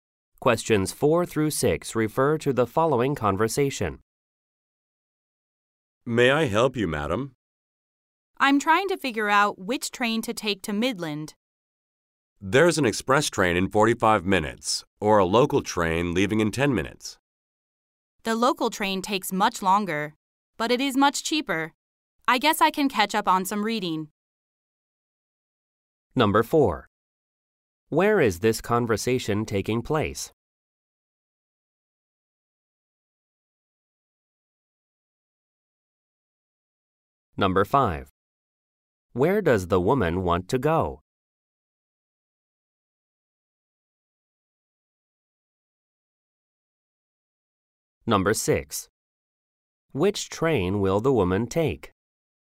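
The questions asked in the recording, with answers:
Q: Where is this conversation taking place?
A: At a train station

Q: Where does the woman want to go?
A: Midland

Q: Which train will the woman take?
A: The local train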